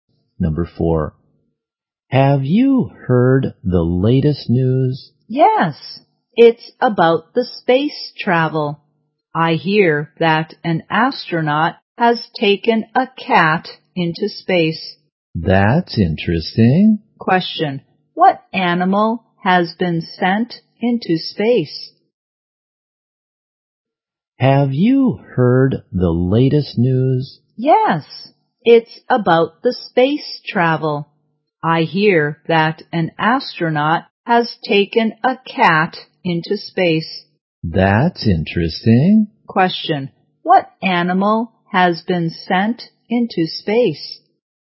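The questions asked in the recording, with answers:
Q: Question, what animal has been sent into space?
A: A cat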